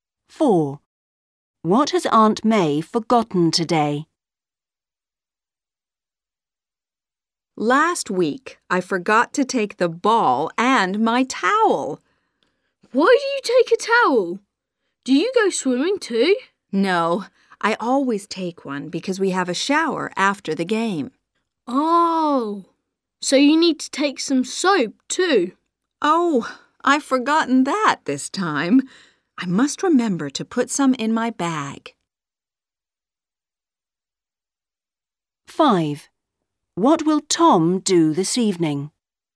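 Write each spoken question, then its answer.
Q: What has Aunt May forgotten today?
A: Soap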